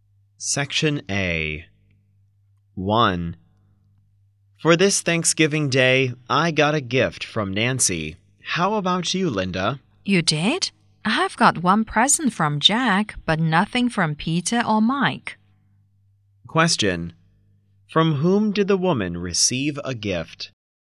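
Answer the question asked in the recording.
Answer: From Jack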